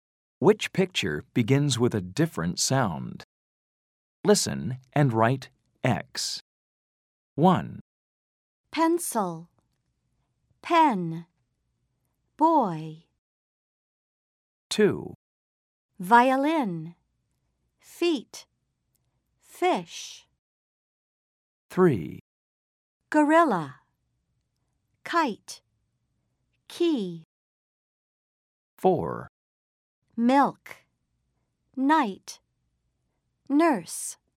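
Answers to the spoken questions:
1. Boy
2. Violin
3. Gorilla
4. Milk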